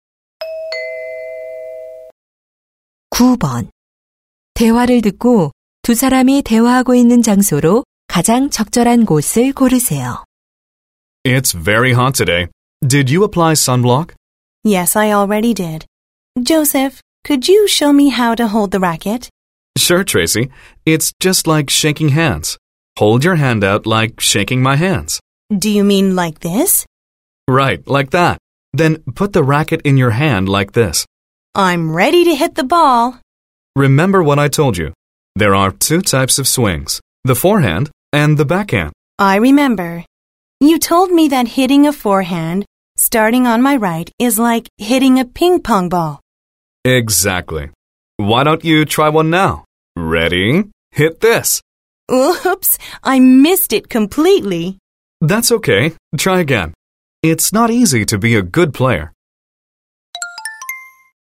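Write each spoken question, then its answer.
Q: 대화를 듣고 두 사람이 대화하고 있는 장소로 가장 적절한 곳을 고르세요.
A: 테니스장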